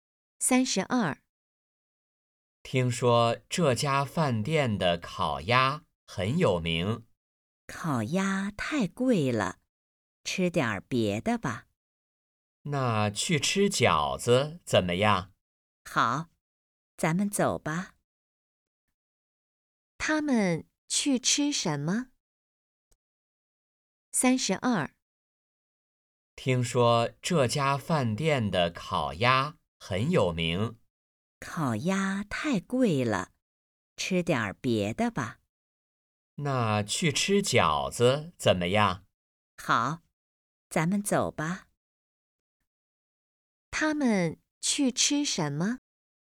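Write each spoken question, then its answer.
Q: 他们去吃什么?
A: 饺子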